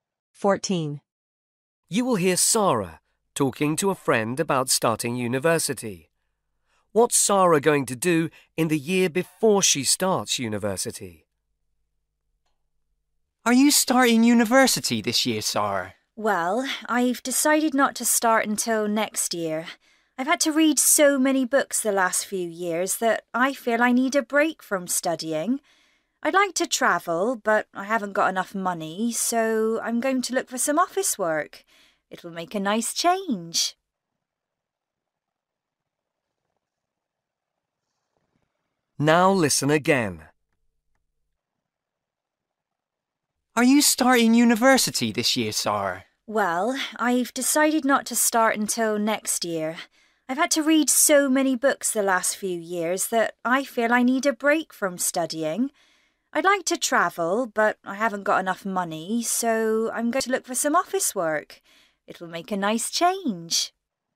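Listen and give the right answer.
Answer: work in an office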